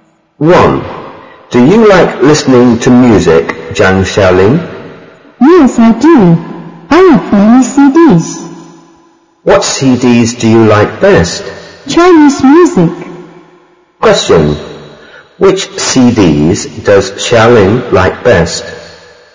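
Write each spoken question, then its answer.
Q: Which CDs does Xiaoling like best?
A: Chinese music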